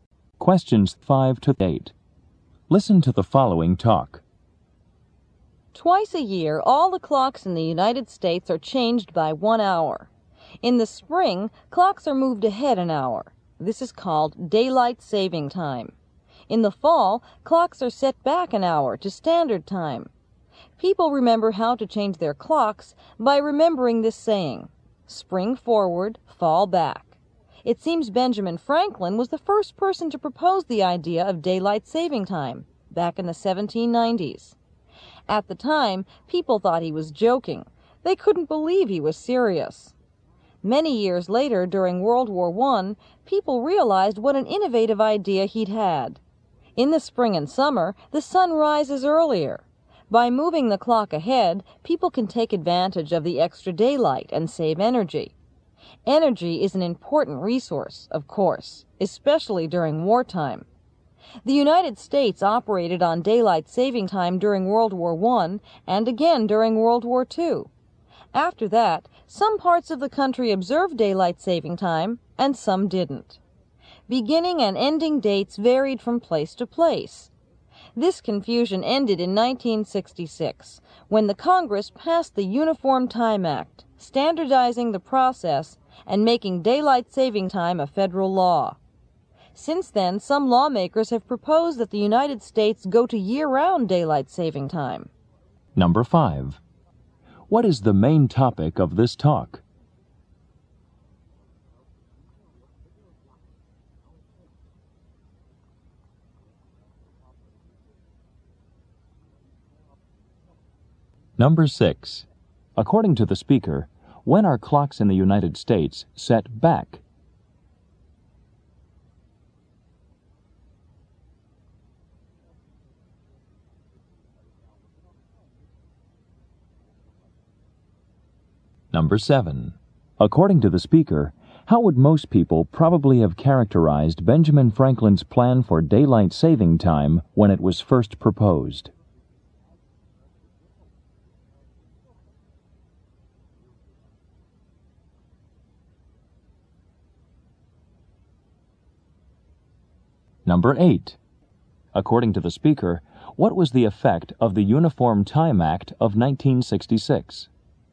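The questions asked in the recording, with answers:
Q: What is the main topic of this talk?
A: Daylight saving time.

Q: According to the speaker, when are clocks in the United States set back?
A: In the fall.

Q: According to the speaker, how would most people probably have characterized Benjamin Franklin's plan for daylight saving time when it was first proposed?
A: As a joke.

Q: According to the speaker, what was the effect of the Uniform Time Act of 1966?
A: It standardized daylight saving time and made it federal law.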